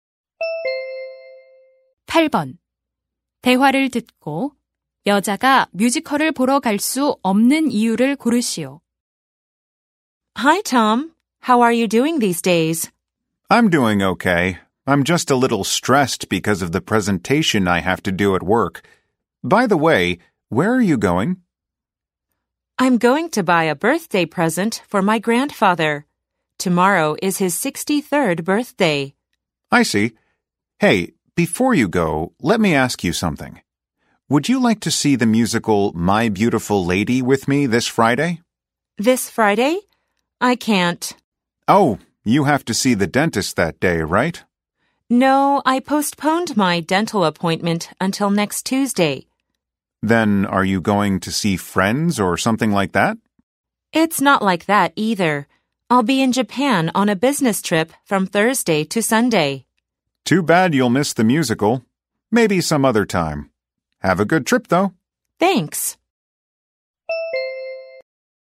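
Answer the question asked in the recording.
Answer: 일본 출장을 가야 해서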